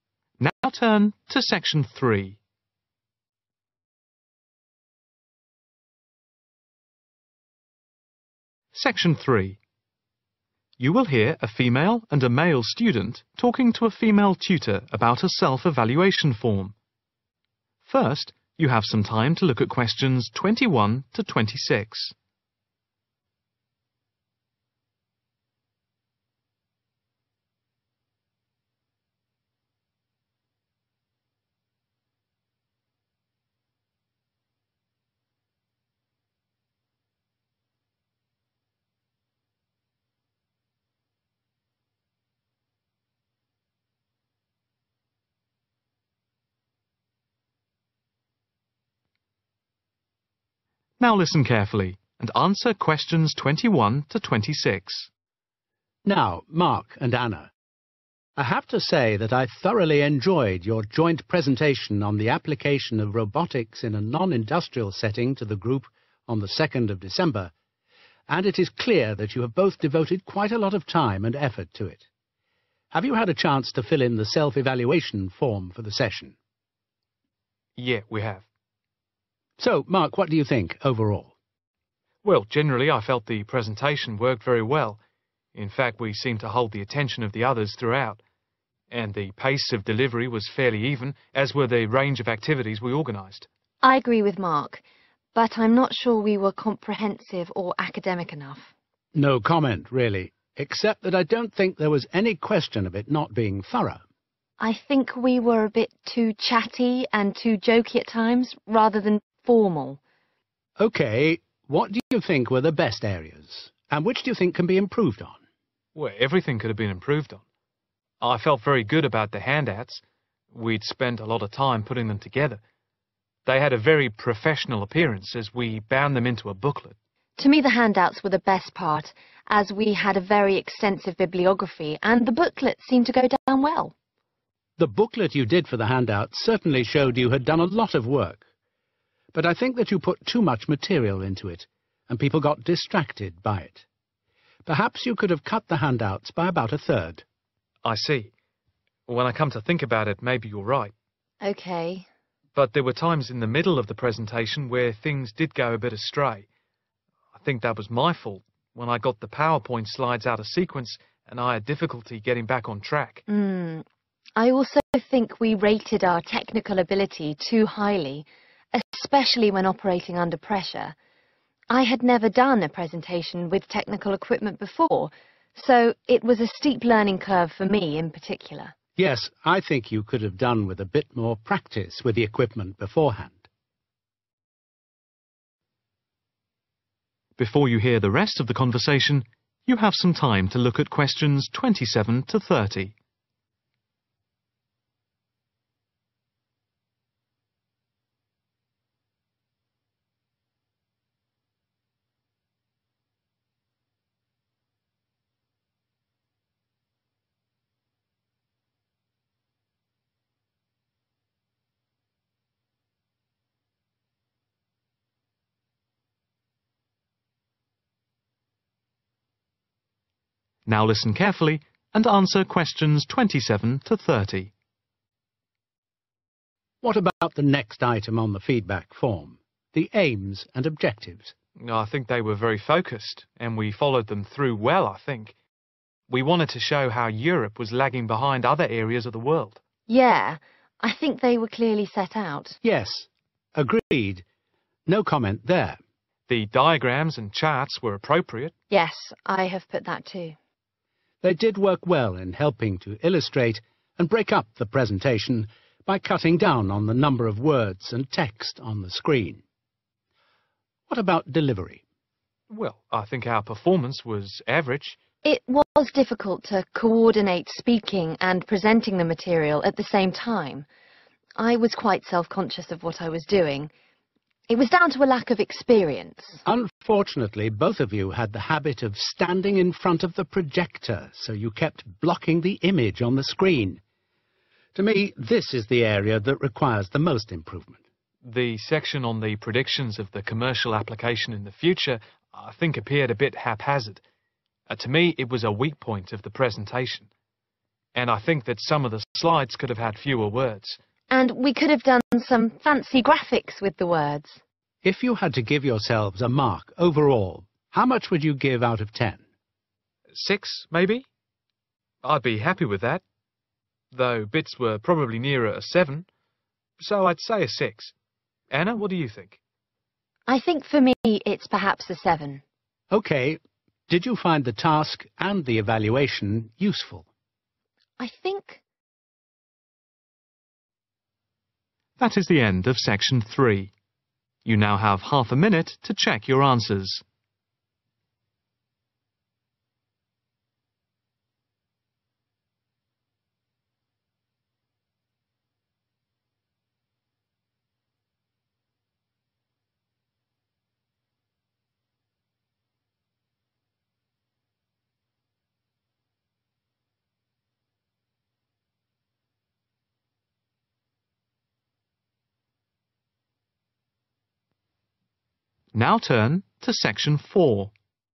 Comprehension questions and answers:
Complete the form below. Write NO MORE THAN THREE WORDS AND/OR A NUMBER for each answer.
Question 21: Date:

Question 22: not thorough or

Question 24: reduce by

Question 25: power-point slides not in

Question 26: overestimated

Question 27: clearly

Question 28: performance was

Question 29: needs the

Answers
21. 2nd December
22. academic
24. about a third
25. sequence
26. technical ability
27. set out
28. average
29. most improvement